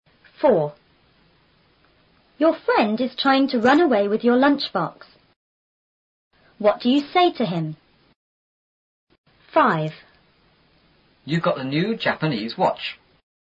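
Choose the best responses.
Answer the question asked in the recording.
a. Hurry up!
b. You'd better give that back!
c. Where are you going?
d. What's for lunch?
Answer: b. You'd better give that back!

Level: 初中英语广州版4B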